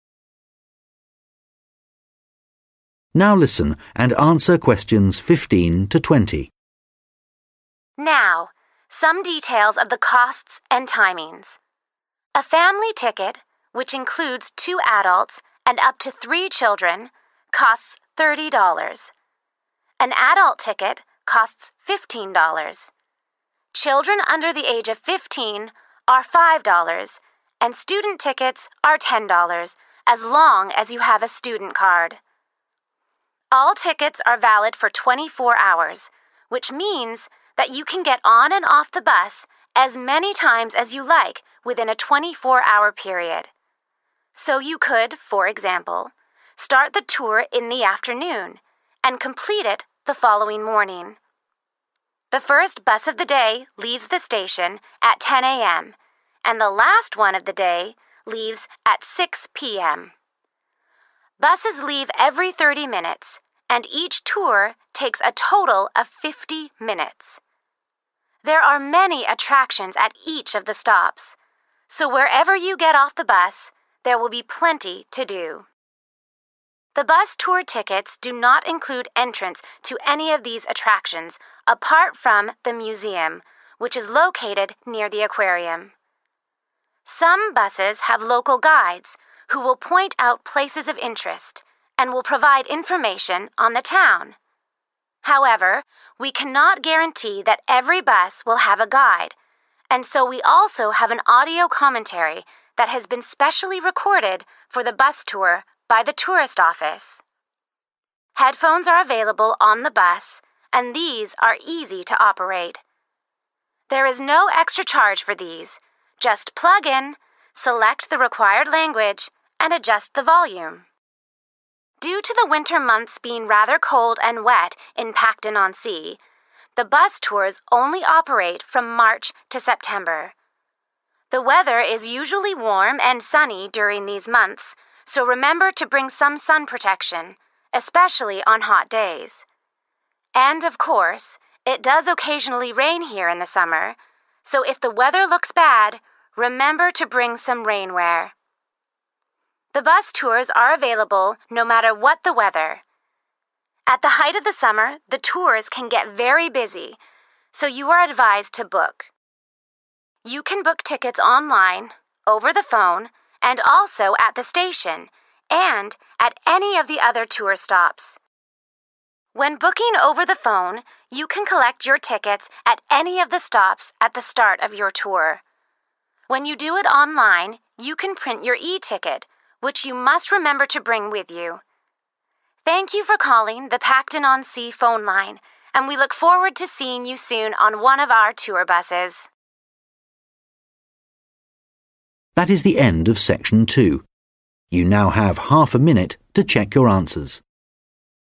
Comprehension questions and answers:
Questions 15-20 Complete the sentences below. Write NO MORE THAN TWO WORDS AND/OR A NUMBER for each answer.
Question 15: You need to have a 15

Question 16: to buy a ticket for £10. The bus tour lasts 16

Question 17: in total. The cost of the bus ticket includes entrance to the 17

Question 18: . You can listen to an audio commentary which has been made by the 18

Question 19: . If the weather is wet, it is a good idea to bring 19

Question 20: . Don't forget to bring your 20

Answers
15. student card
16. fifty minutes
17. museum
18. tourist office
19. rain wear
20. e ticket

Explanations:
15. An adult ticket costs £15, children under the age of fifteen are £5 and student tickets are £10 as long as you have a student card (Vé người lớn là £15, trẻ em dưới mười lăm tuổi là £5 và vé sinh viên là £10 miễn là bạn có thẻ sinh viên)
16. Buses leave every thirty minutes and each tour takes a total of fifty minutes (Xe buýt khởi hành cứ sau ba mươi phút và mỗi chuyến tham quan mất tổng cộng năm mươi phút)
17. The bus tour tickets do not include entrance to any of these attractions apart from the museum which is located near the aquarium (Vé tham quan bằng xe buýt không bao gồm vé vào cổng bất kỳ điểm tham quan nào ngoài bảo tàng nằm gần thủy cung)
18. However, we cannot guarantee that every bus will have a guide and so we also have an audio commentary that has been specially recorded (=made) for the bus tour by the tourist office (Tuy nhiên, chúng tôi không thể đảm bảo rằng mọi xe buýt sẽ có hướng dẫn viên và vì vậy chúng tôi cũng có một bản thuyết minh đã được văn phòng du lịch ghi âm lại đặc biệt cho chuyến tham quan bằng xe buýt)